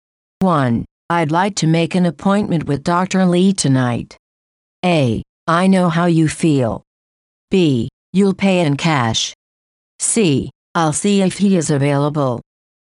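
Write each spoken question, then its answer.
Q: I'd like to make an appointment with Dr. Lee tonight.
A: C: I'll see if he is available.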